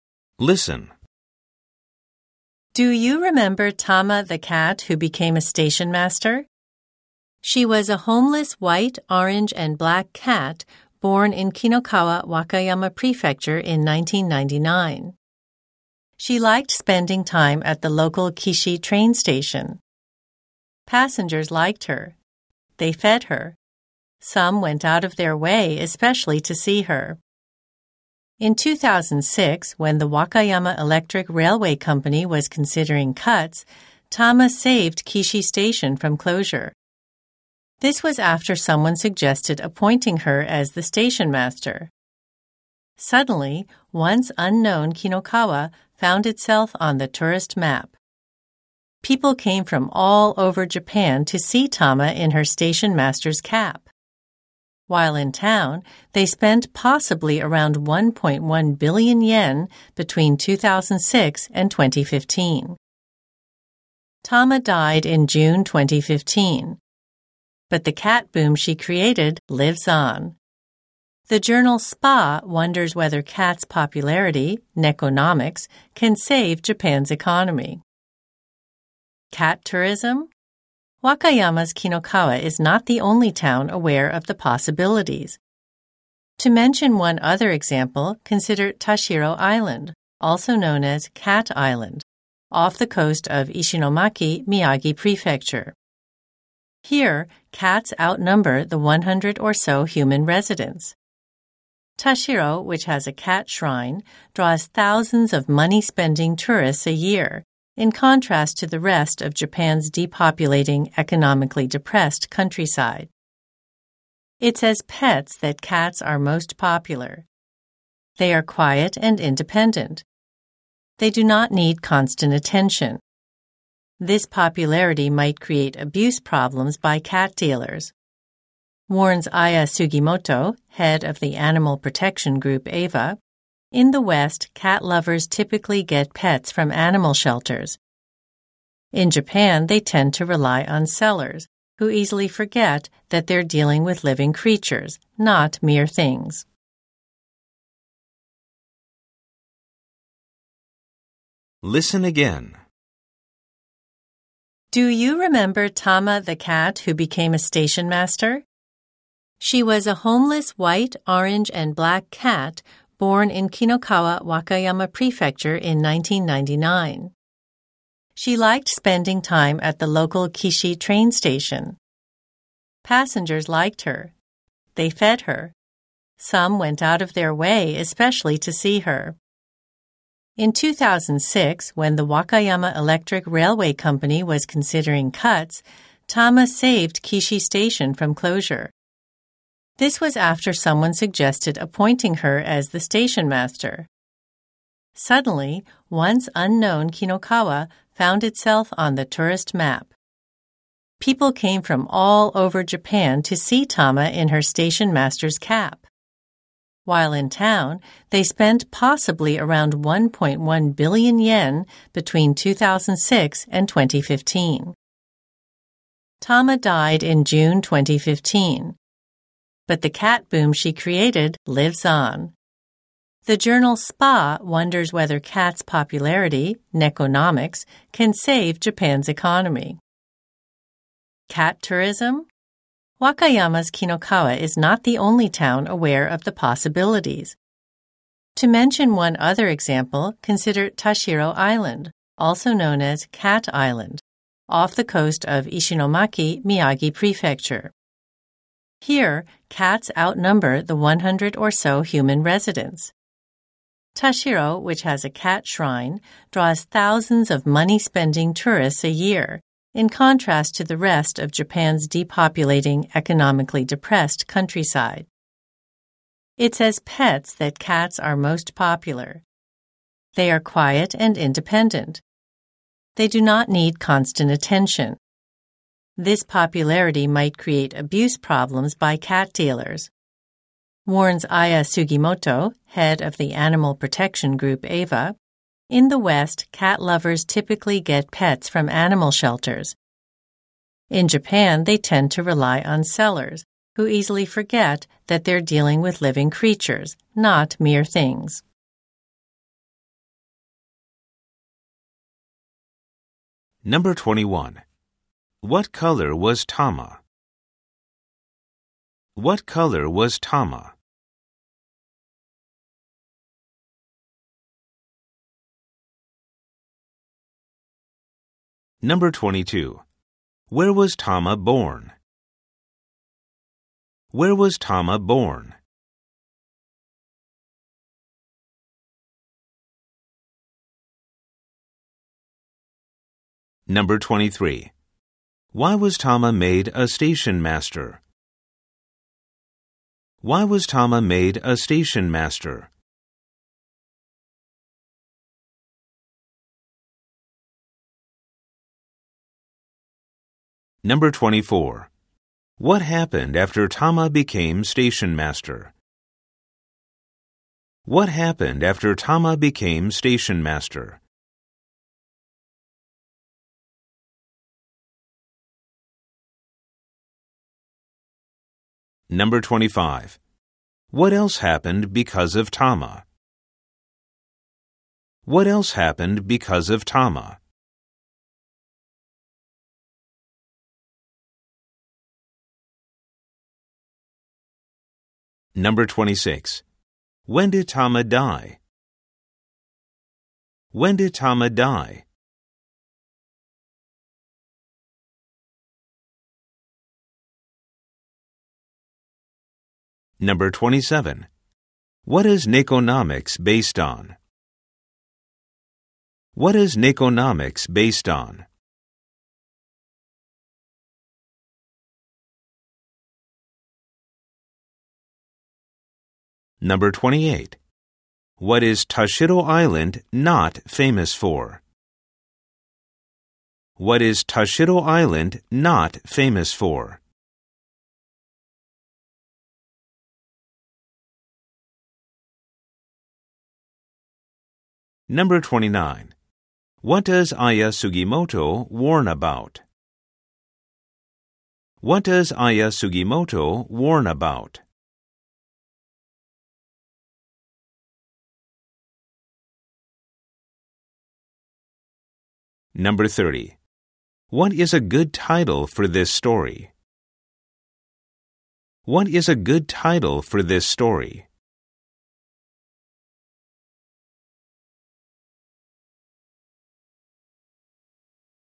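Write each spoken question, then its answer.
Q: What color was Tama?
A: White, orange, and black

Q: Where was Tama born?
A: In Kinokawa, Wakayama Prefecture

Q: What happened after Tama became station master?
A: Kinokawa became a tourist destination

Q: When did Tama die?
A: In June 2015

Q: What is Nikonomics based on?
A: The popularity of cats

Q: What does Aya Sugimoto warn about?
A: Abuse problems by cat dealers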